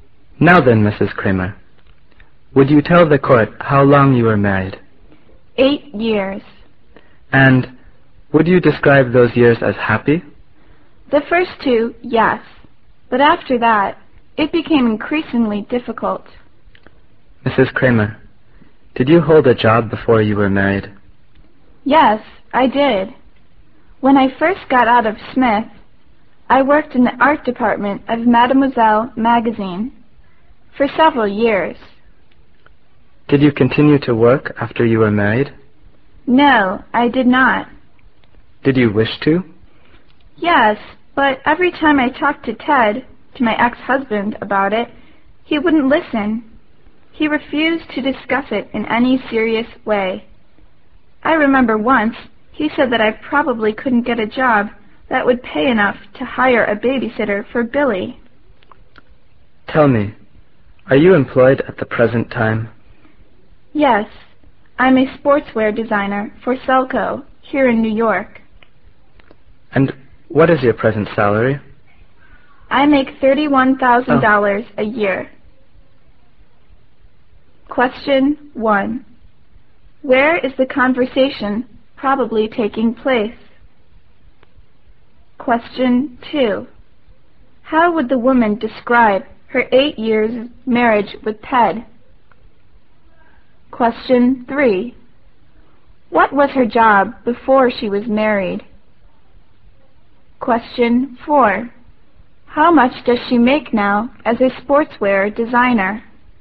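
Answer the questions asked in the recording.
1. In a court
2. Happy for the first two years, then increasingly difficult
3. She worked in the art department of Mademoiselle magazine
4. $31,000 a year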